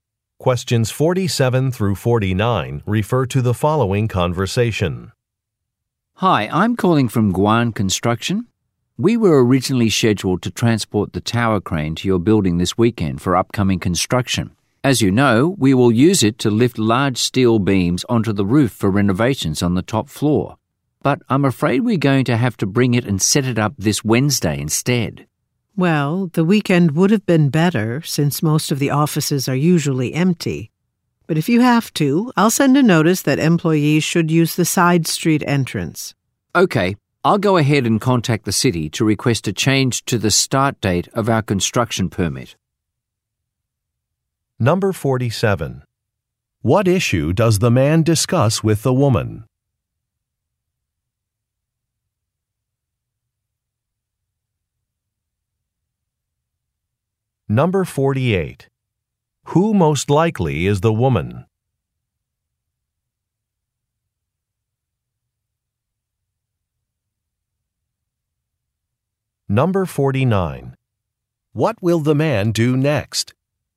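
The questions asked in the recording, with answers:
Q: What issue does the man discuss with the woman?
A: The tower crane has to be brought and set up earlier, on Wednesday instead of the weekend

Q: What will the man do next?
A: Contact the city to change the start date of the construction permit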